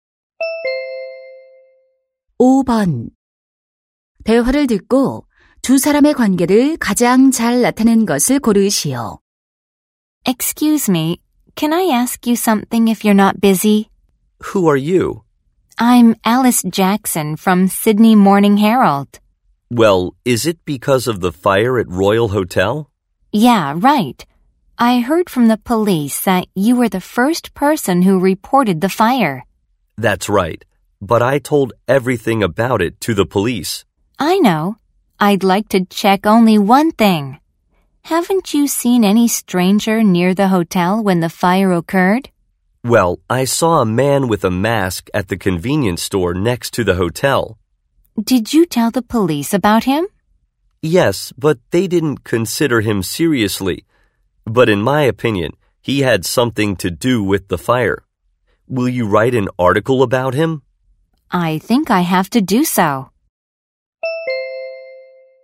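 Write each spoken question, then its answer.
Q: 대화를 듣고 두 사람의 관계를 가장 잘 나타낸 것을 고르시오.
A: 신문 기자와 화재 신고자(목격자)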